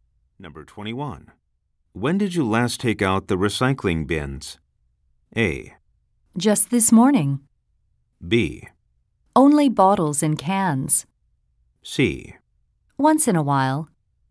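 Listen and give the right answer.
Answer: A: Just this morning.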